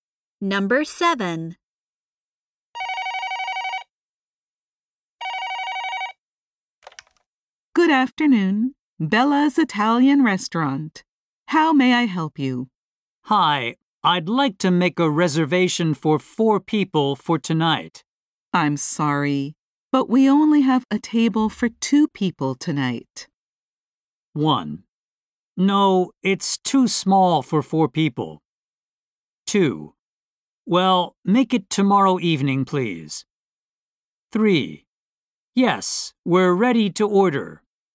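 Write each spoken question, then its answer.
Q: I'm sorry, but we only have a table for 2 people tonight.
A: 2: Well, make it tomorrow evening, please.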